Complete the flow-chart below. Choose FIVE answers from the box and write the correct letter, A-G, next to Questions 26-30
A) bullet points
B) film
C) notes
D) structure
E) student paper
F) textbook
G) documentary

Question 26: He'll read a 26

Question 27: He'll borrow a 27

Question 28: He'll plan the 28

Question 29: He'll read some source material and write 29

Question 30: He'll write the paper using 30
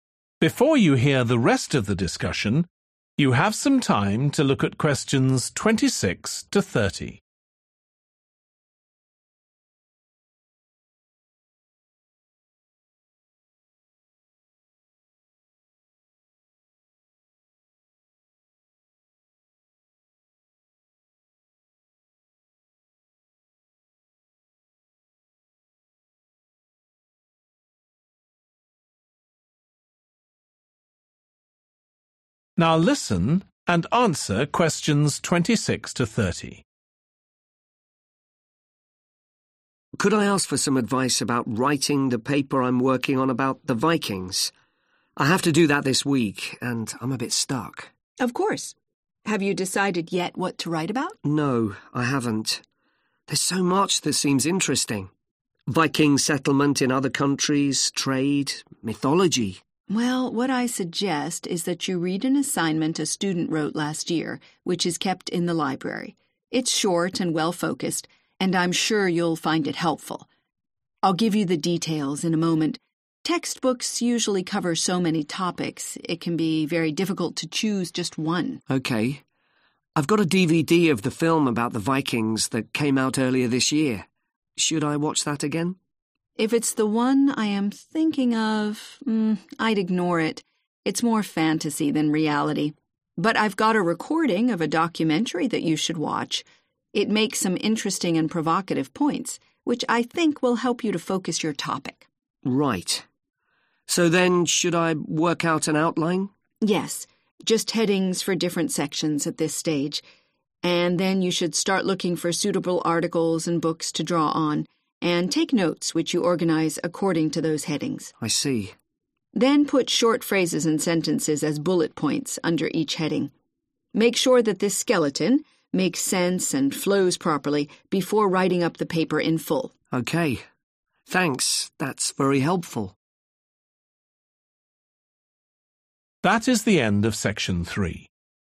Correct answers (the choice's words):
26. student paper
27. documentary
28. structure
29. notes
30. bullet points